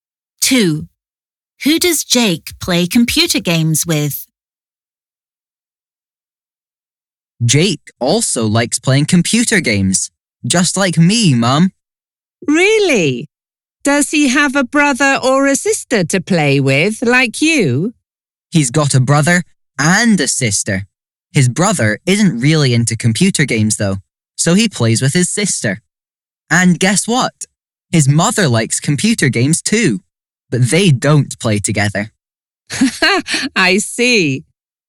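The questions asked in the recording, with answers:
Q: Who does Jake play computer games with?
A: His sister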